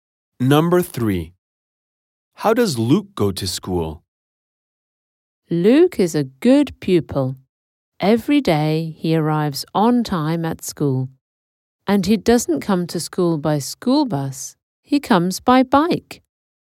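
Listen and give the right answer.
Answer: By bike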